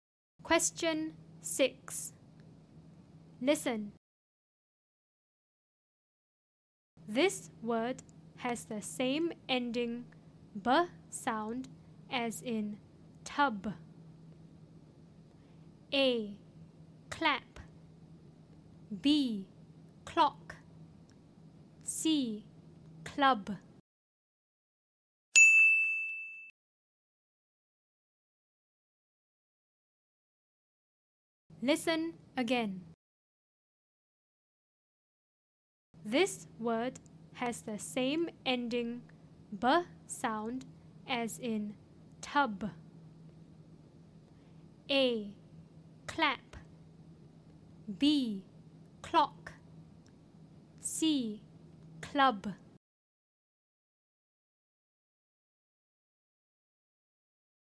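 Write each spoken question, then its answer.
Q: This word has the same ending b sound as in tub.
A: C: Club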